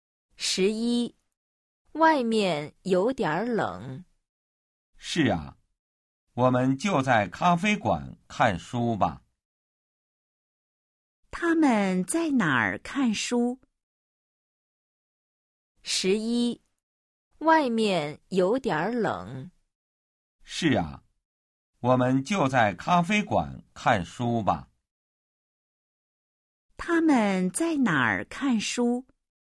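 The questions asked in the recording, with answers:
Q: 他们在哪儿看书?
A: 在咖啡馆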